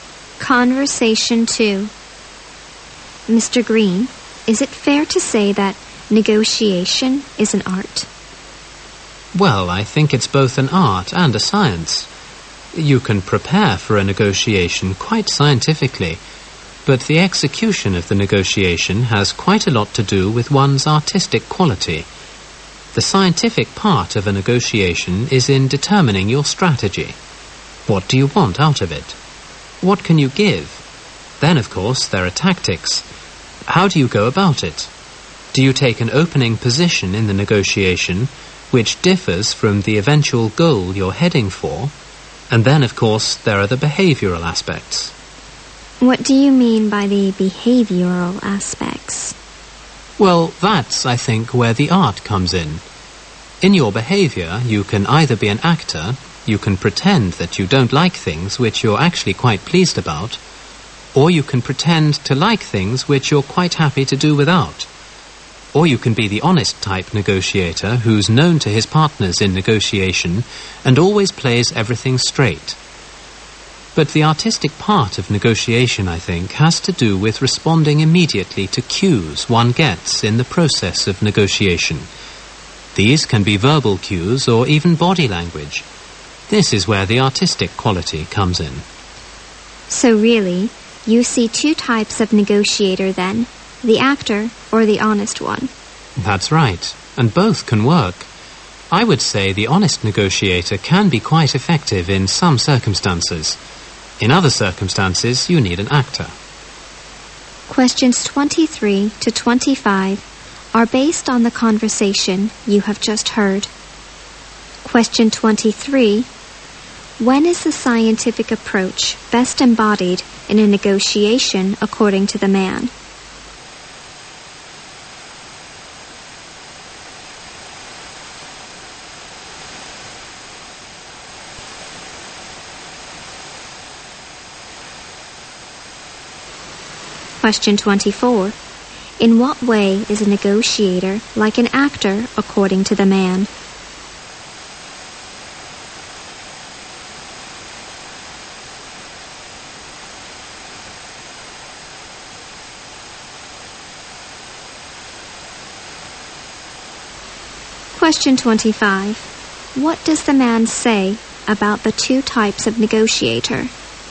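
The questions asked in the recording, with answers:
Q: When is the scientific approach best embodied in a negotiation according to the man?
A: In determining one's strategy.

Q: In what way is a negotiator like an actor according to the man?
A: He pretends to dislike things he likes or like things he doesn't need.

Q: What does the man say about the two types of negotiator?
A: Both can work, depending on the circumstances.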